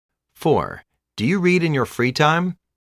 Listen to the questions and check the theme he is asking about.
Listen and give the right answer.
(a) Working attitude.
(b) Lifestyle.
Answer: (b) Lifestyle.